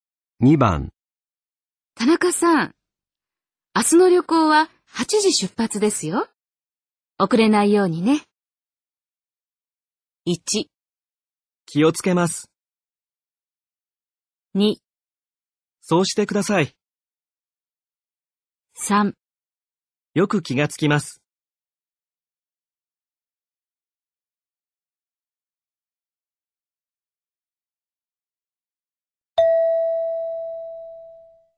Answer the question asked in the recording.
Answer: 1

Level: N3 Listening · Test 15